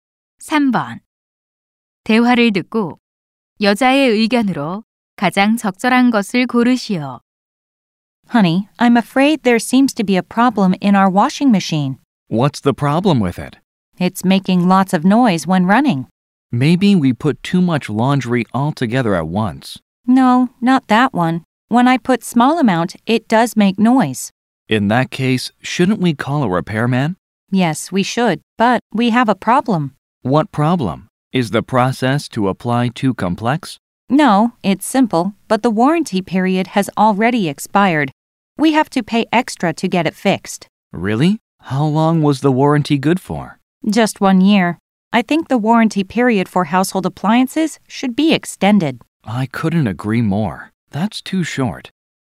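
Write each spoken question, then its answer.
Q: 대화를 듣고 여자의 의견으로 가장 적절한 것을 고르시오.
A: 가전제품의 보증 기간이 연장되어야 한다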